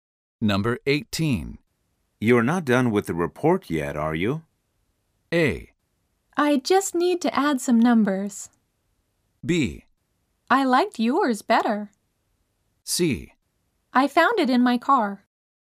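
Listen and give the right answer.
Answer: A: I just need to add some numbers.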